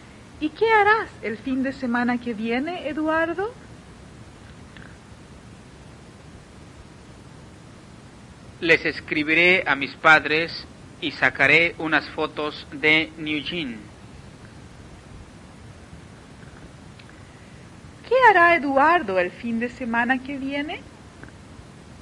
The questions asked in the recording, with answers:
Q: ¿Qué hará Eduardo el fin de semana que viene?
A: Eduardo les escribirá a sus padres y sacará unas fotos de Eugene.